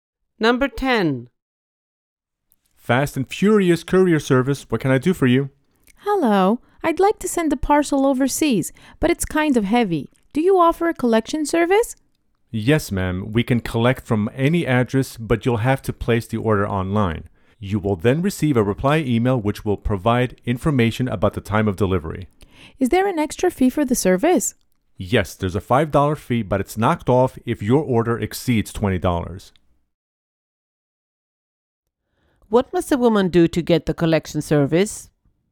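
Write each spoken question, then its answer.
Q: What must a woman do to get the collection service?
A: Place the order online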